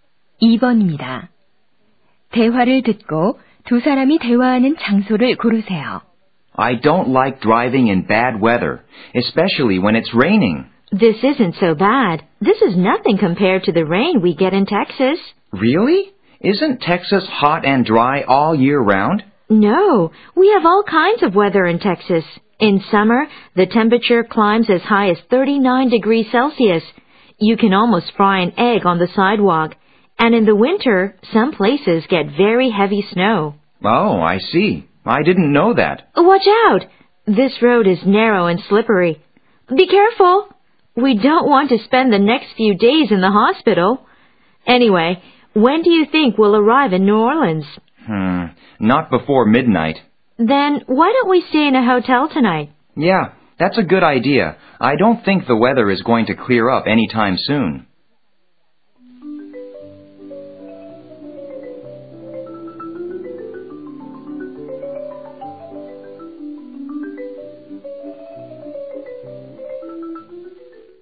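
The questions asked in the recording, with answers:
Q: 대화를 듣고 두 사람이 대화하는 장소를 고르세요.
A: 자동차 안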